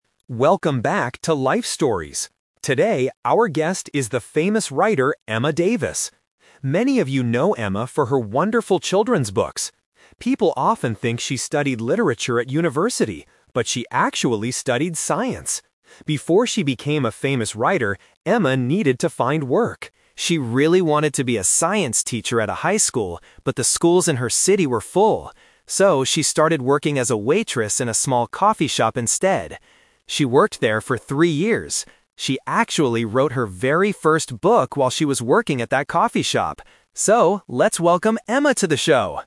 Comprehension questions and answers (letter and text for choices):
Listen to a podcast host introducing a famous writer named Emma Davis. For each question, choose the correct answer (A, B, or C).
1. What did Emma study at university?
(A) Literature.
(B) Science.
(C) History.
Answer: (B) Science.

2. What job did Emma want to do after university?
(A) A science teacher.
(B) A writer.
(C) A waitress.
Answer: (A) A science teacher.

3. Where did Emma work before she was famous?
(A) At a high school.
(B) At a library.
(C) At a coffee shop.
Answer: (C) At a coffee shop.

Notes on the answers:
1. The host clearly states the twist: "...but she actually studied science." Why the traps are wrong: Option A is the "Twist Trap". The host says people think she studied literature because she writes books, but she didn't. Option C is not mentioned.
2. The host says, "She really wanted to be a science teacher at a high school..." Why the traps are wrong: Option B is what she is now, but not what she looked for right after university. Option C is a "Twist Trap". She became a waitress, but she didn't want to be one.
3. The host explains her actual job: "So, she started working as a waitress in a small coffee shop instead." Why the traps are wrong: Option A is the trap. She wanted to work at a high school, but the schools were full. Option B is plausible for a writer, but it is not mentioned in the audio.

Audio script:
Host: Welcome back to 'Life Stories'. Today, our guest is the famous writer, Emma Davis.
Many of you know Emma for her wonderful children's books. People often think she studied literature at university, but she actually studied science.
Before she became a famous writer, Emma needed to find work. She really wanted to be a science teacher at a high school, but the schools in her city were full. So, she started working as a waitress in a small coffee shop instead.
She worked there for three years. She actually wrote her very first book while she was working at that coffee shop! So, let's welcome Emma to the show!